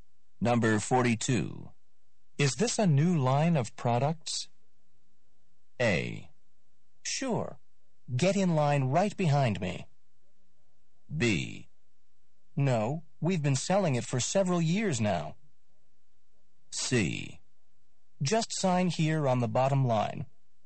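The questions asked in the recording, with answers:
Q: Is this a new line of products?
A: B: No, we've been selling it for several years now.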